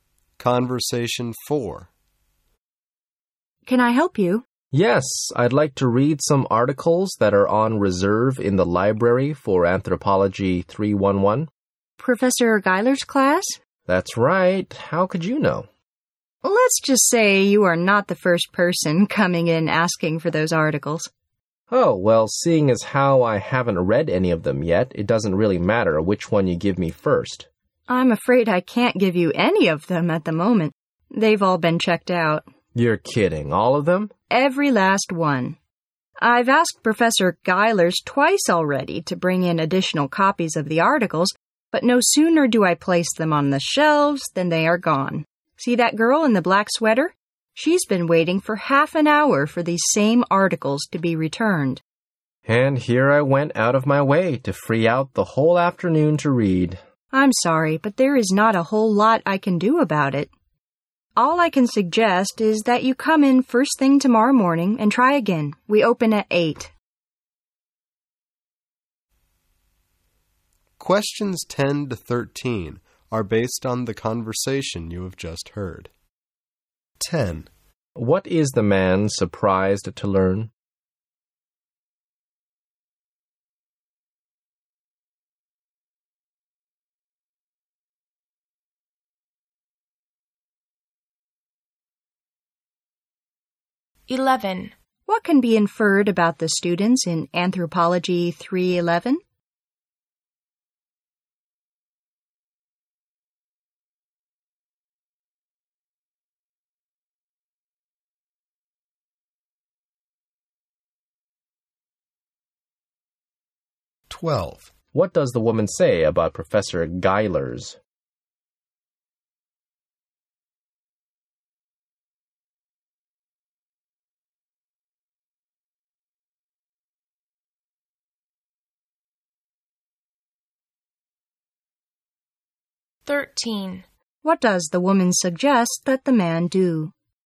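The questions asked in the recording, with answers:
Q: What is the man surprised to learn?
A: All the reserved articles have been checked out

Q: What does the woman suggest that the man do?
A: Come back first thing tomorrow morning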